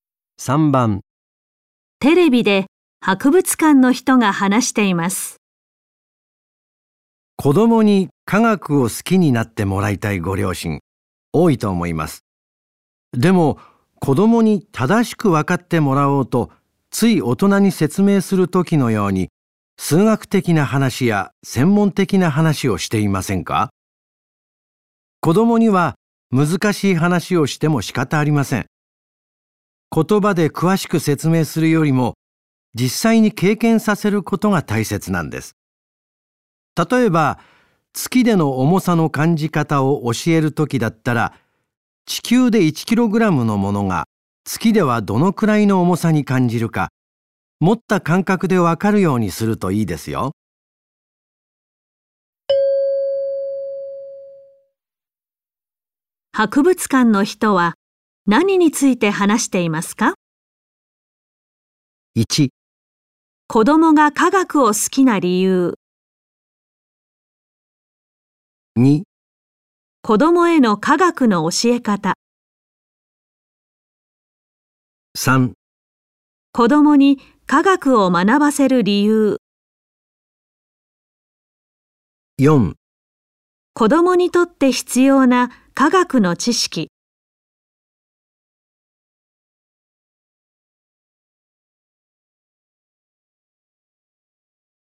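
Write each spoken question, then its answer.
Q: 博物館の人は、何について話していますか?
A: 2: 子供への科学の教え方。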